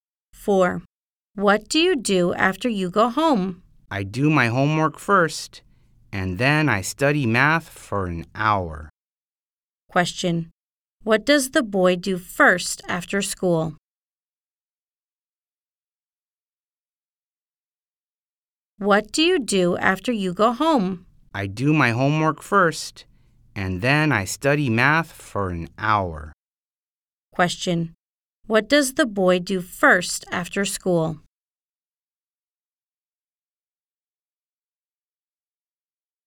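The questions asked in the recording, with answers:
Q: What does the boy do first after school?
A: He does his homework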